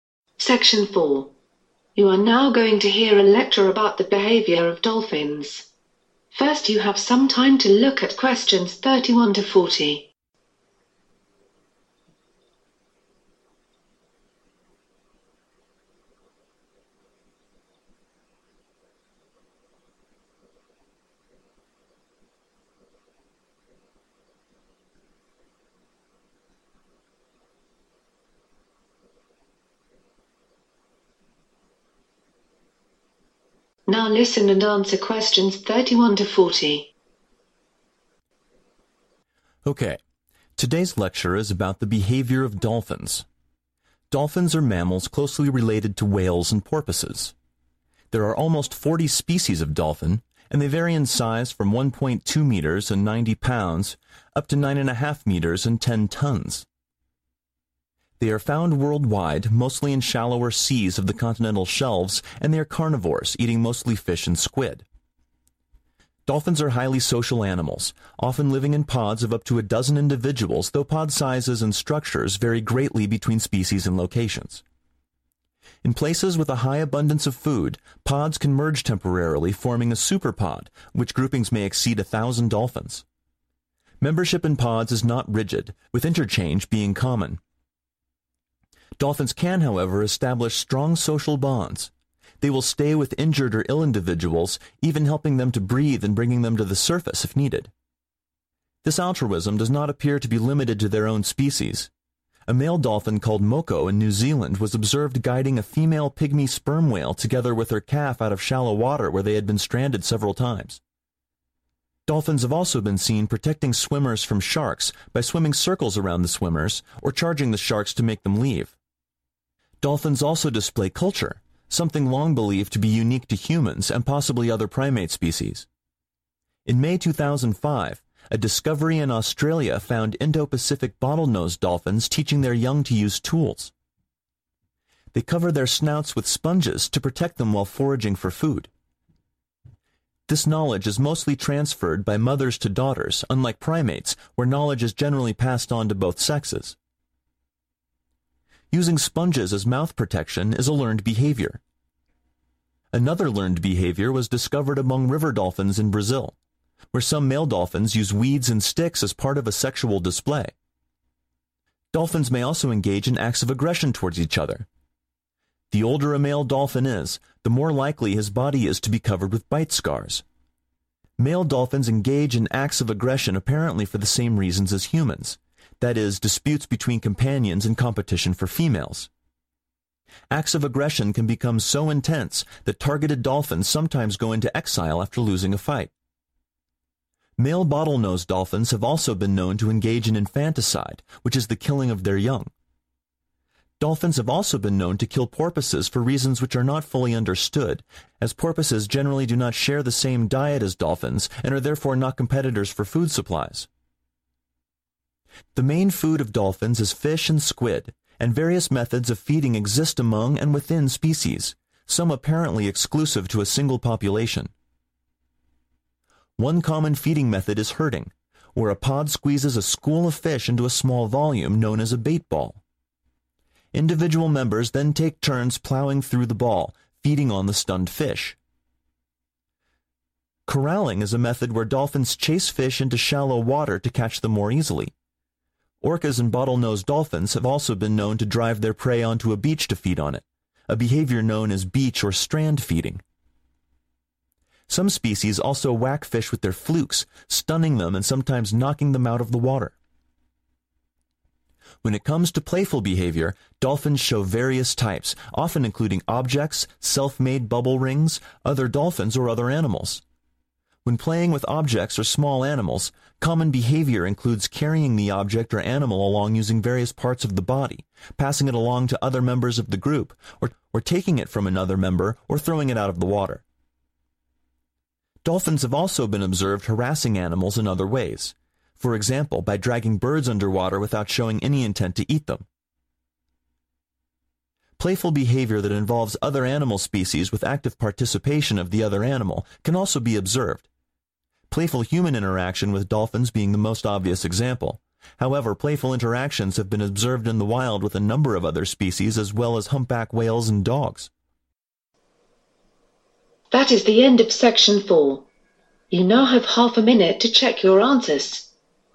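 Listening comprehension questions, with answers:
Write NO MORE THAN TWO WORDS AND/OR A NUMBER for each answer.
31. found (31)...............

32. super-pods may have more than (32)........... dolphins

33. Moko helped a whale and calf escape from (33)...........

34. discovered in May 2005 that young bottlenose dolphins learn to (34)...........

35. dolphins pass knowledge from mothers to daughters, whereas primates pass to (35)..............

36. Like humans, this is due to disagreements over (36).......... and competition for females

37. dolphins have a variety of feeding methods, some of which are (37)............ to one population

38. (38)............. or strand feeding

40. playful behaviour may include other (40)............ such as humans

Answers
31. worldwide
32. 1,000
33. shallow water
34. use tools
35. both sexes
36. companions
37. exclusive
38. beach
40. animal species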